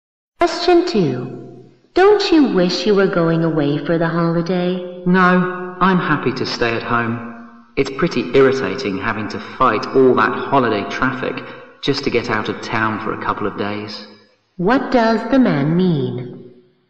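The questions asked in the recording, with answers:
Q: What does the man mean?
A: He would rather stay home than fight the holiday traffic.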